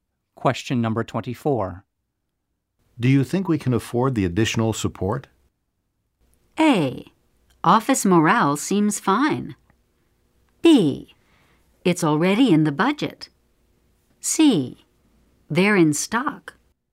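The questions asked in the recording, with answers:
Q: Do you think we can afford the additional support?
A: B: It's already in the budget.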